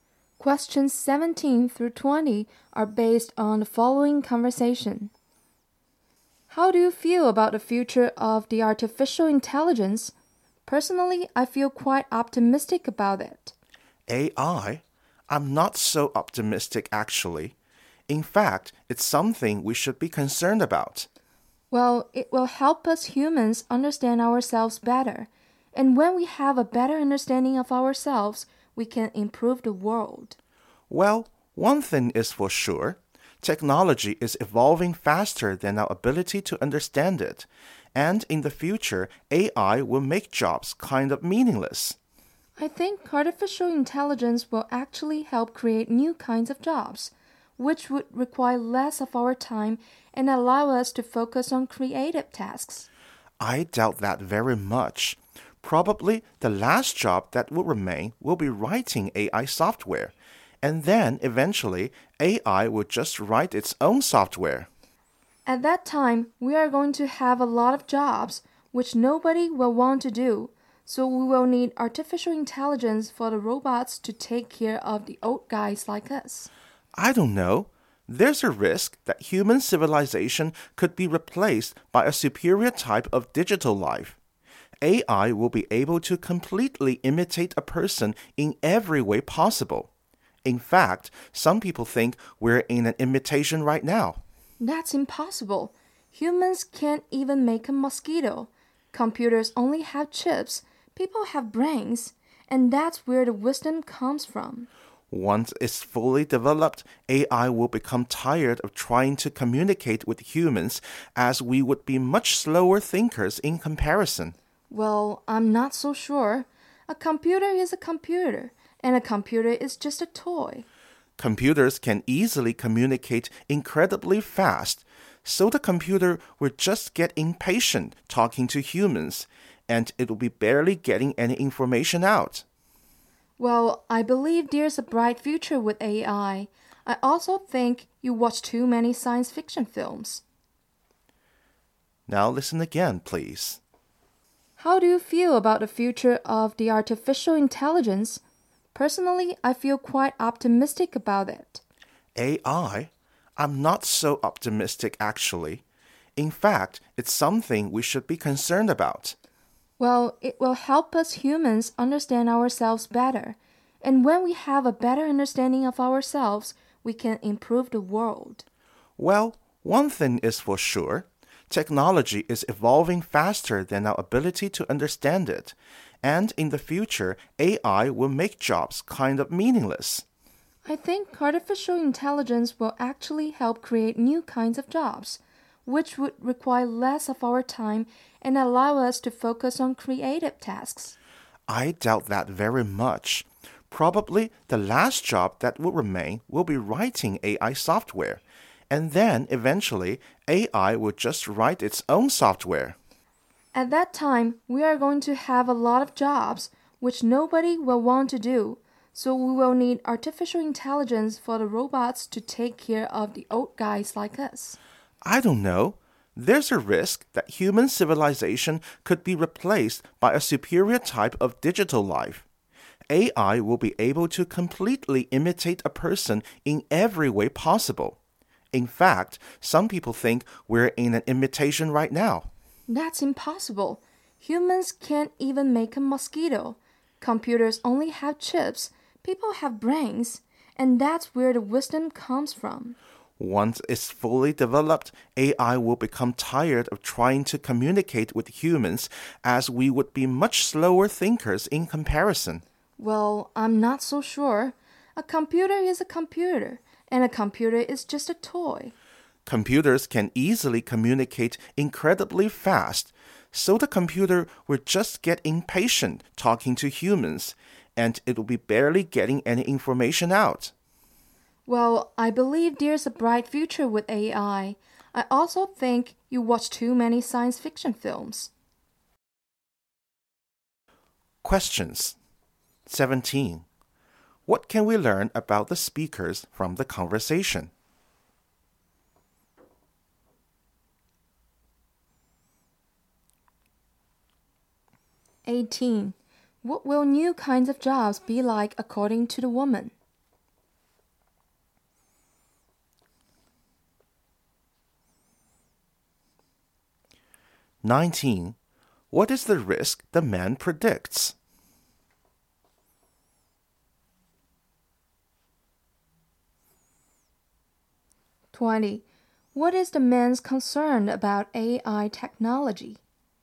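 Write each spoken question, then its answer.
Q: What can we learn about the speakers from the conversation?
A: They have different views on the future of AI.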